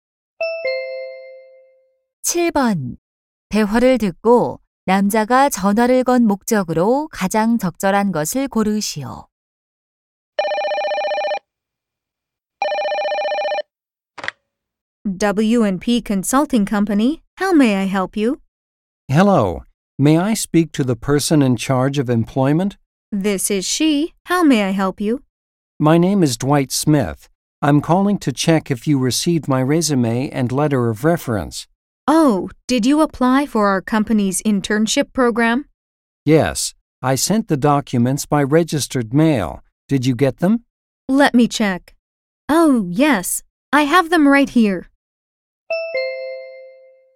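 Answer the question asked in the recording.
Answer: 이력서와 추천서가 도착했는지 확인하려고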